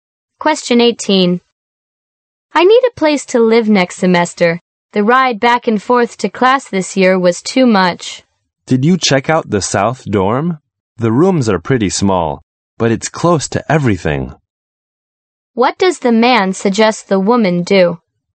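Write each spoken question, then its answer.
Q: What does the man suggest the woman do?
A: Check out the South Dorm.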